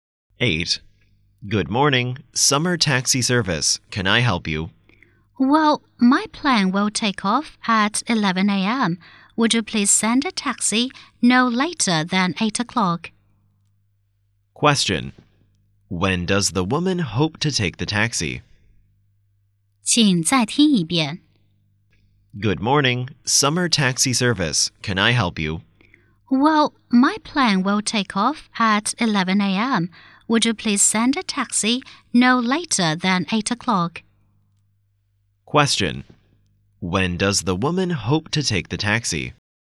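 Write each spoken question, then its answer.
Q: Question. When does the woman hope to take the taxi?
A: No later than 8 o'clock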